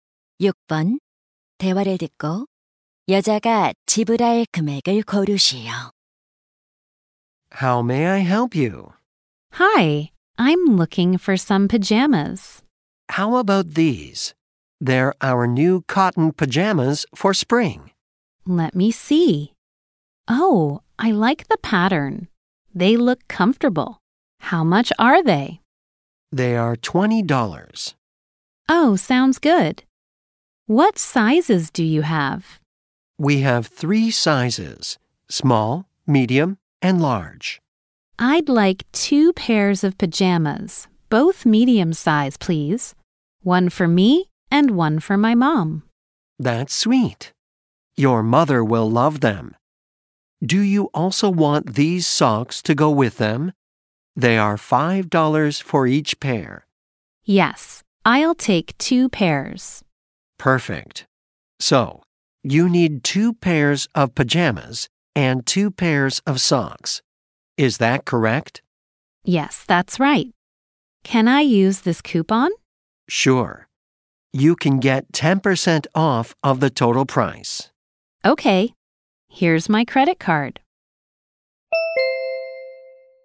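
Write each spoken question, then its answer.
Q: 대화를 듣고 여자가 지불할 금액을 고르시오.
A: $45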